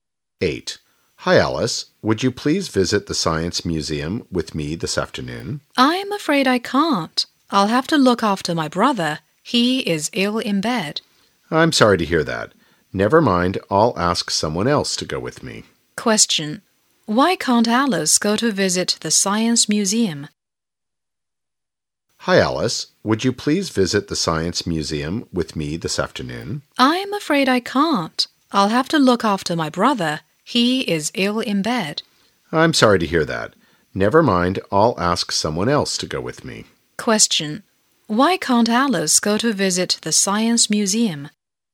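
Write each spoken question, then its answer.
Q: Why can't Alice go to visit the Science Museum?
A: She has to look after her brother, who is ill in bed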